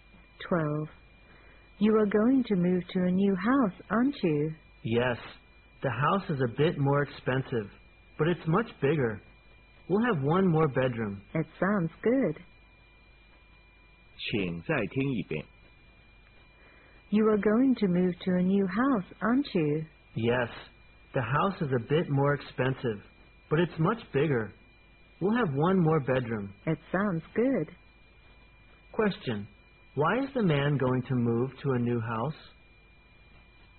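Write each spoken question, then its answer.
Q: Why is the man going to move to a new house?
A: The new house is much bigger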